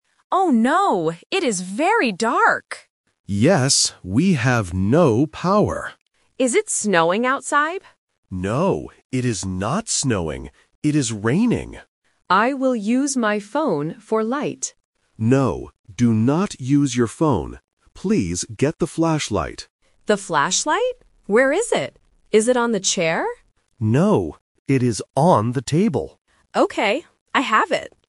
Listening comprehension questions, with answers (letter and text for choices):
Listen to the conversation. Circle the correct answer (A, B, or C).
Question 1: What is the weather like outside?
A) Raining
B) Snowing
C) Sunny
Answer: A) Raining

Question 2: What does the man want the woman to get?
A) A phone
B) A flashlight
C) A candle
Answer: B) A flashlight

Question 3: Where is the flashlight?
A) On the chair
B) On the table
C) On the bed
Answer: B) On the table

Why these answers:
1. The Key: The dad clearly says, "It is raining." The Trap: Option (B) "Snowing" is mentioned when the mom asks "Is it snowing outside?", but the dad answers "No, it is not snowing." Not Mentioned: Option (C) "Sunny" is never mentioned.
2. The Key: The dad explicitly tells the mom, "Please get the flashlight." The Trap: Option (A) "A phone" is mentioned because the mom wants to use her phone for light, but the dad says "No, do not use your phone." Not Mentioned: Option (C) "A candle" is completely new information.
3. The Key: The dad says, "it is on the table." The Trap: Option (A) "On the chair" is mentioned by the mom when she guesses the location ("Is it on the chair?"), but the dad says "No". Not Mentioned: Option (C) "On the bed" is not in the audio.

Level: A1